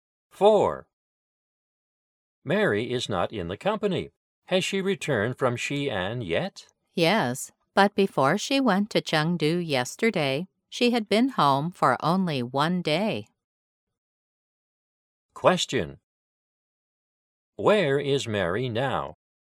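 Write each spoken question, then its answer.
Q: Where is Mary now?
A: In Chengdu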